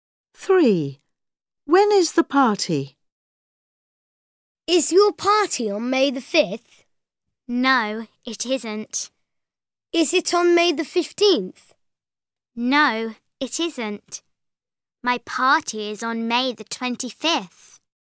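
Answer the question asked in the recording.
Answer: On May the 25th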